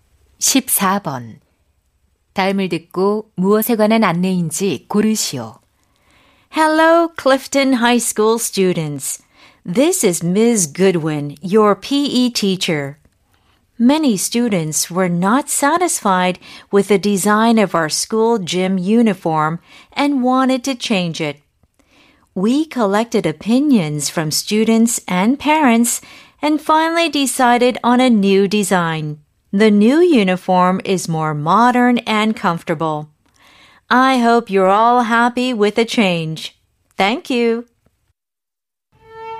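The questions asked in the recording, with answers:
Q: 다음을 듣고 무엇에 관한 안내인지 고르시오.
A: 새 체육복 디자인 결정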